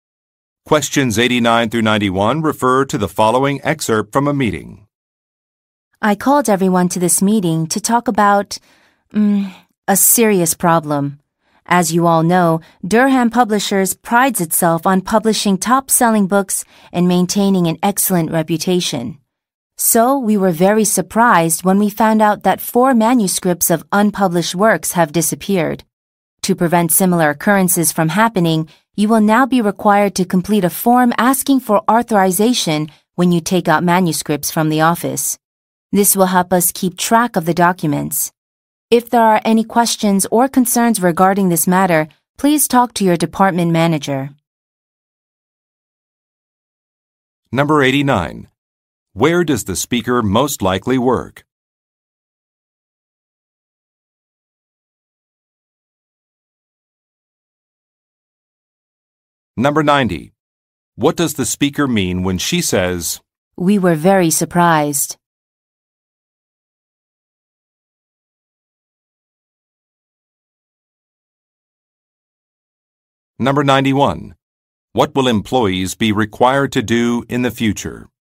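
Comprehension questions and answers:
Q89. Where does the speaker most likely work?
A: At a publishing company.

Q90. What does the speaker mean when she says, "we were very surprised"?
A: Some documents are missing

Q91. What will employees be required to do in the future?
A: Fill out an authorization form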